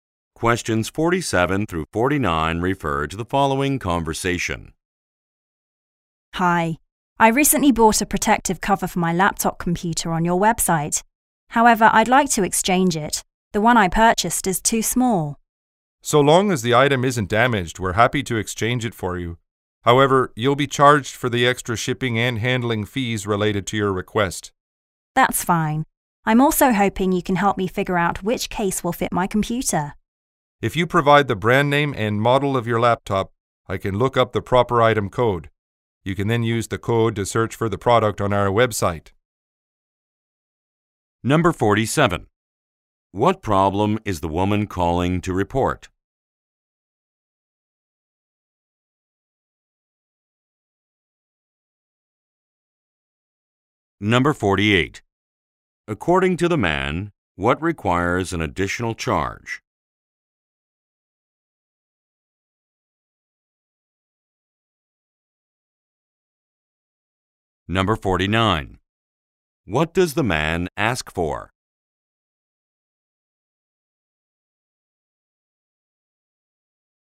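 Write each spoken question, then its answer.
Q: What problem is the woman calling to report?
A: The laptop cover she bought is too small

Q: According to the man, what requires an additional charge?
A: Shipping and handling for the exchange

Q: What does the man ask for?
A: The brand name and model of her laptop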